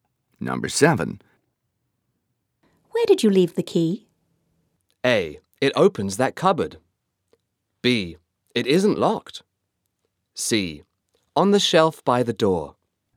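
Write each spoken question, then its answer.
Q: Where did you leave the key?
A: C: On the shelf by the door.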